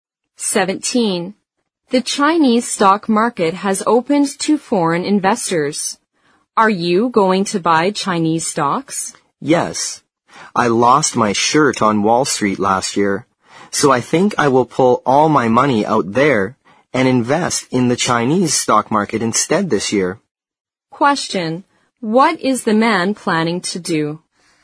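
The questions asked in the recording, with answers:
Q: What is the man planning to do?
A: Move his money out of Wall Street and invest it in the Chinese stock market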